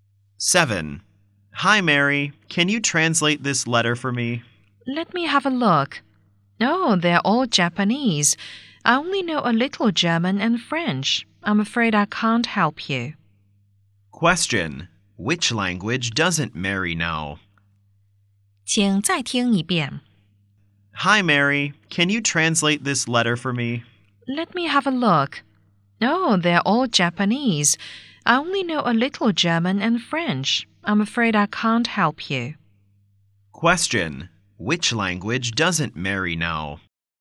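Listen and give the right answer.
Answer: Japanese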